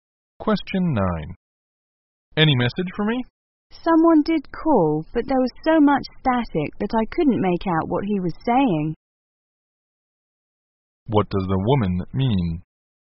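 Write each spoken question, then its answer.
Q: What does the woman mean?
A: She couldn't understand the caller's message because of static.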